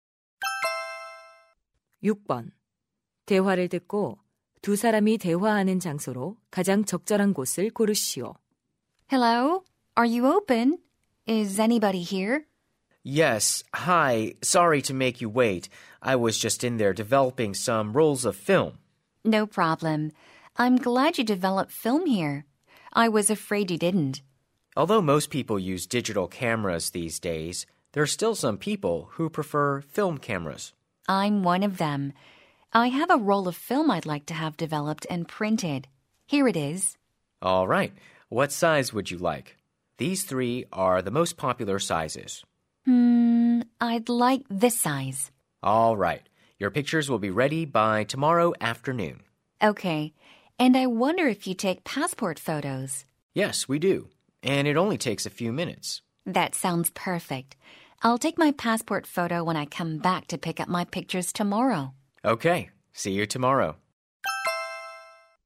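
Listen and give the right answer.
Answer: 사진관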